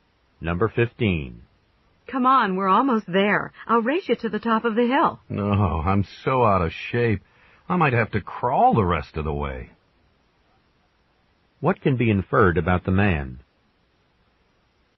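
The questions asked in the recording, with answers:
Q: What can be inferred about the man?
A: He is out of shape and tired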